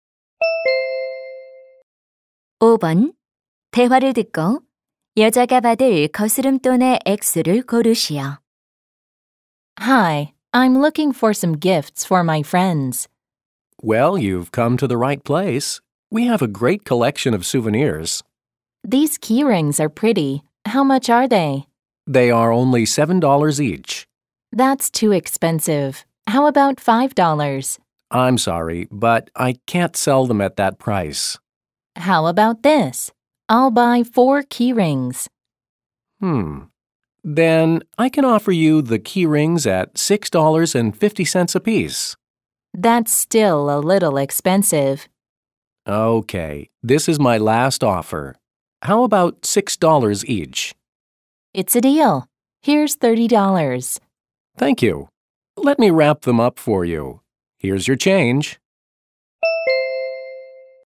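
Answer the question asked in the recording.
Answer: 6달러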